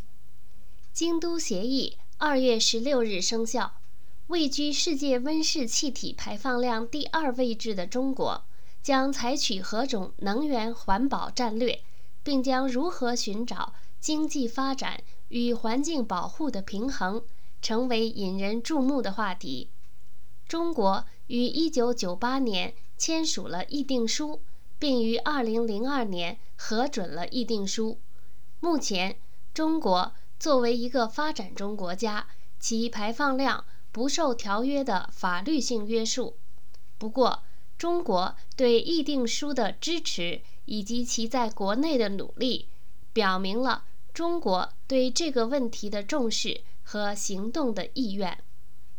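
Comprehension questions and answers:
Please answer the following questions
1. 中国签署《京都协议》说明了什么?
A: 表明了中国对温室气体问题的重视和行动的意愿

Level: 3rd Year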